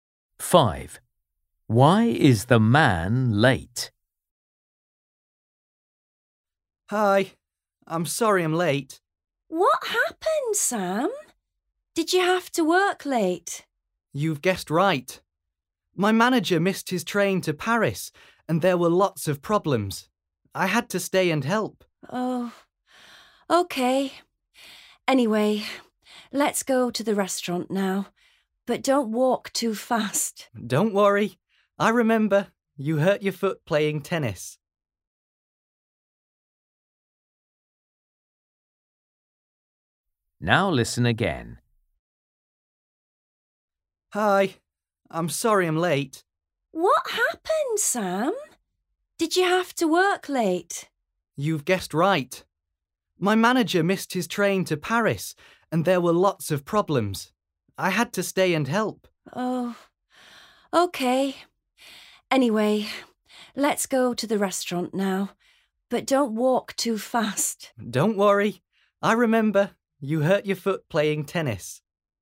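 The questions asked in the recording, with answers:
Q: Why is the man late?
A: He had to work late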